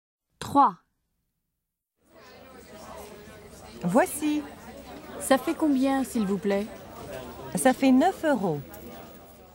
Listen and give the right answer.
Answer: 9 euros.